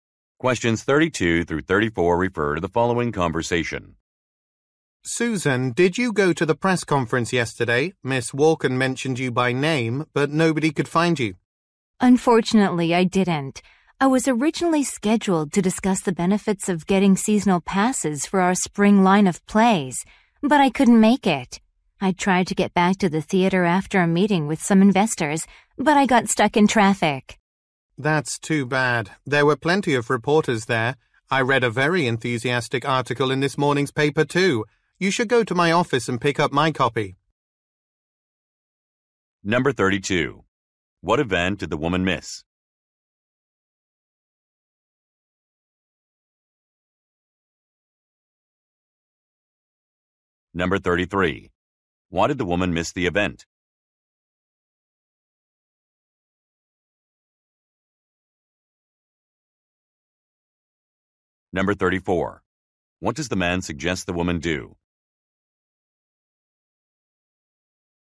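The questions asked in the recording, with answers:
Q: What event did the woman miss?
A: A press conference

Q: Why did the woman miss the event?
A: She got stuck in traffic

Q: What does the man suggest the woman do?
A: Pick up his copy of the newspaper from his office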